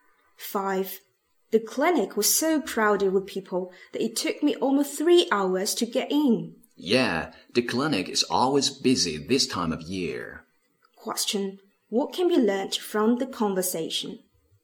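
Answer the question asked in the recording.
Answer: The clinic is busy at this time of year.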